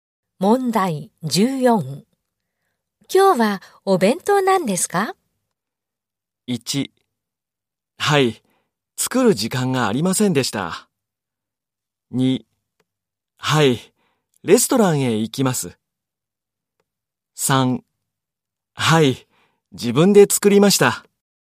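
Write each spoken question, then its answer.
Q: 今日はお弁当なんですか?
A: 3: はい、自分で作りました。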